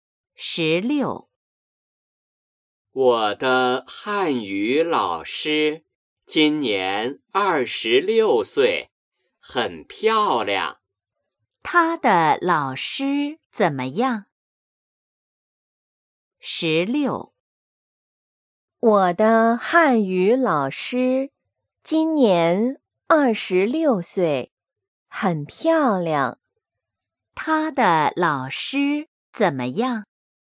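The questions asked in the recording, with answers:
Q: 他的老师怎么样?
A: 很漂亮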